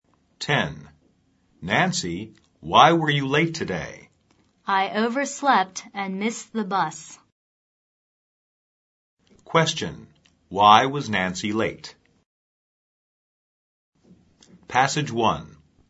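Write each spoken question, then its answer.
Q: Why was Nancy late?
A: She overslept and missed the bus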